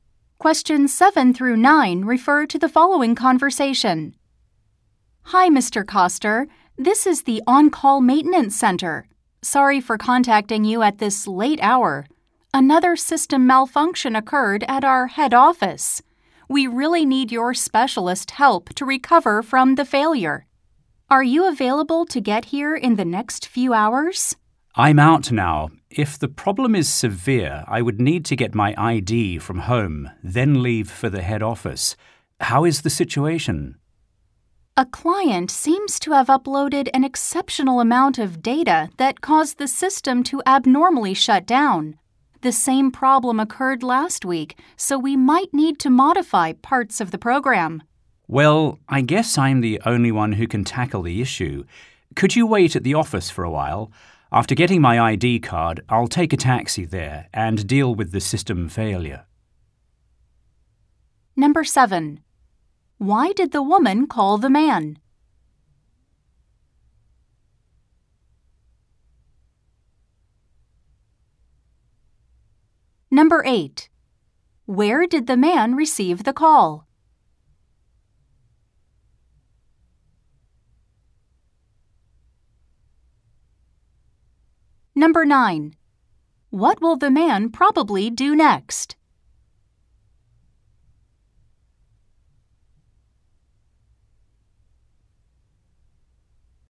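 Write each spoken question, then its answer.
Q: Why did the woman call the man?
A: To ask him to come and fix a system malfunction at the head office

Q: What will the man probably do next?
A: Go home to get his ID card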